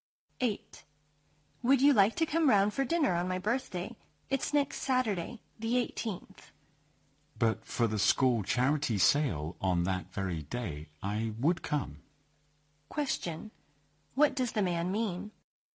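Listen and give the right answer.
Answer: He can't come because of the school charity sale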